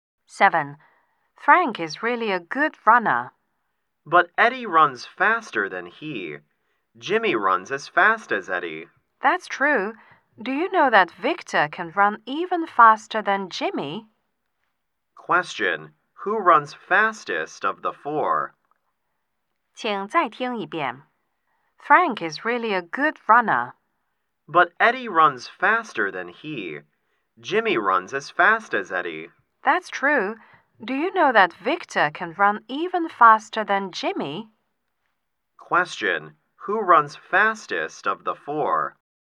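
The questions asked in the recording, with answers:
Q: Who runs fastest of the four?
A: Victor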